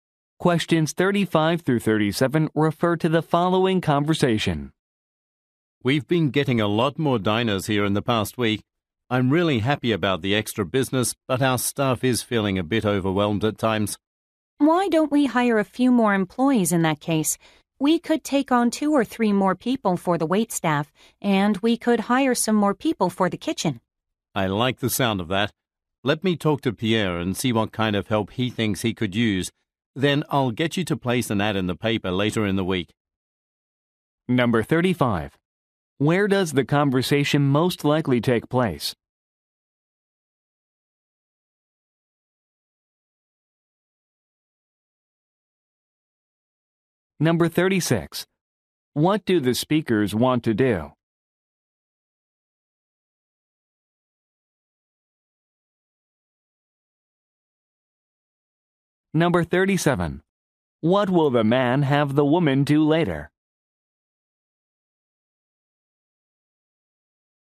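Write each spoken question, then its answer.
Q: Where does the conversation most likely take place?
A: At a restaurant

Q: What do the speakers want to do?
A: Hire more employees

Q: What will the man have the woman do later?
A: Place an ad in the paper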